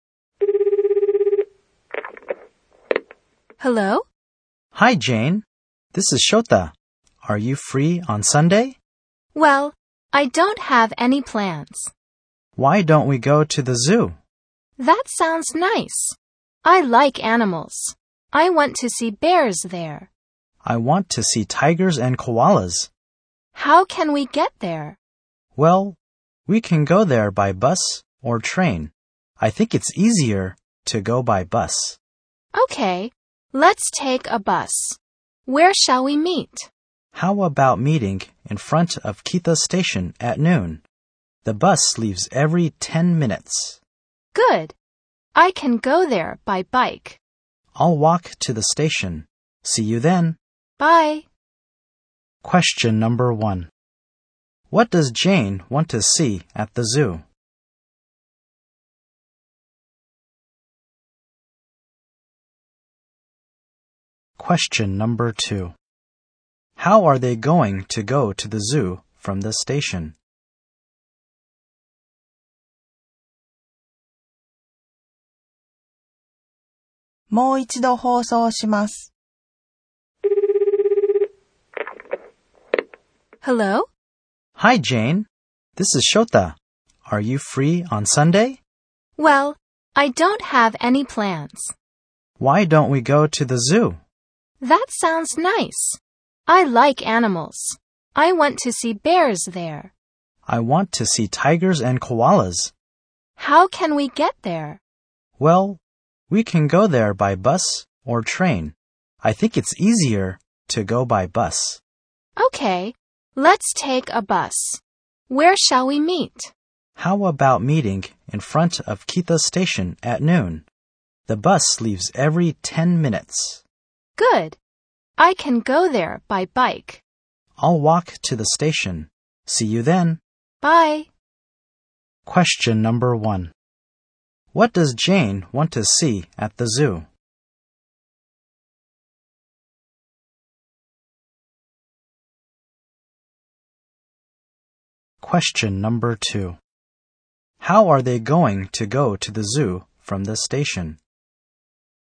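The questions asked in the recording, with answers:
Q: How are they going to go to the zoo from the station?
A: By bus.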